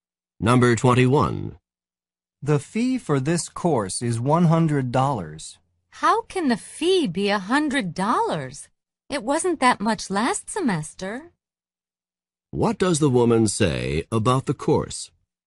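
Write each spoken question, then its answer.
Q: What does the woman say about the course?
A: The fee has increased since last semester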